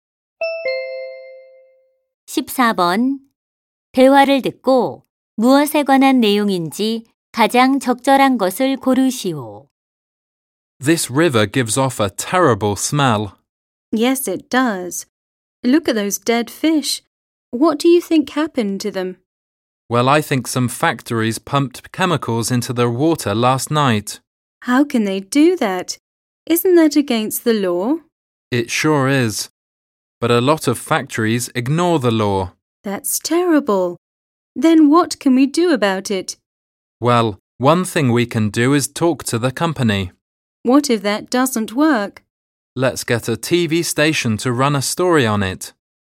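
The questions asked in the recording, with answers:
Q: 대화를 듣고 무엇에 관한 내용인지 가장 적절한 것을 고르시오.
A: 공장의 화학물질로 인한 수질 오염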